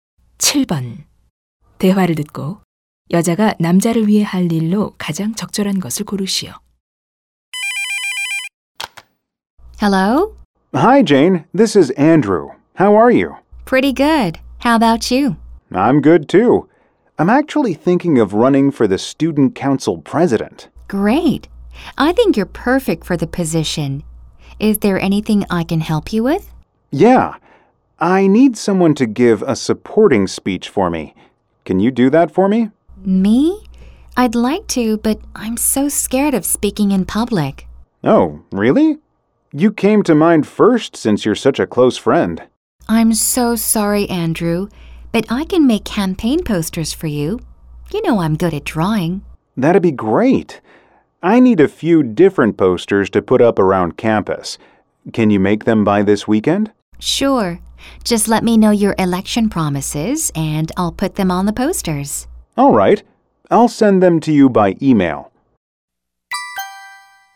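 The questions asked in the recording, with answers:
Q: 대화를 듣고 여자가 남자를 위해 할 일로 가장 적절한 것을 고르시오.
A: 선거 운동 포스터 만들기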